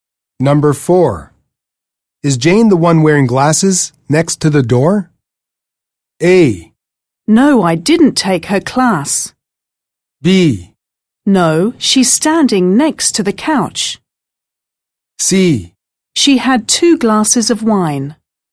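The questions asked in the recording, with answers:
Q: Is Jane the one wearing glasses next to the door?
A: B: No, she's standing next to the couch.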